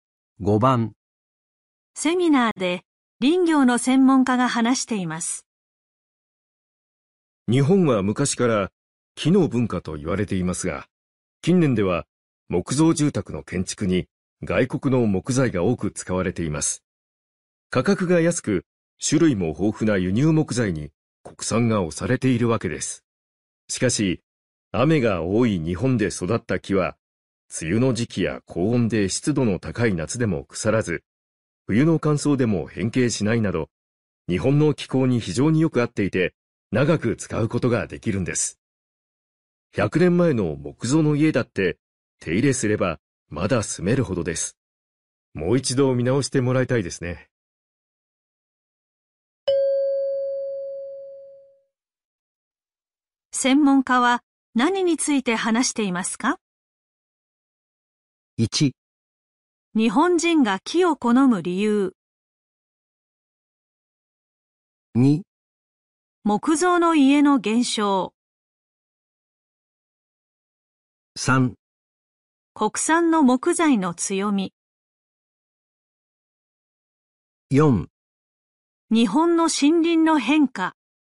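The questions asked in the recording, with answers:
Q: 専門家は何について話していますか?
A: 3: 国産の木材の強み。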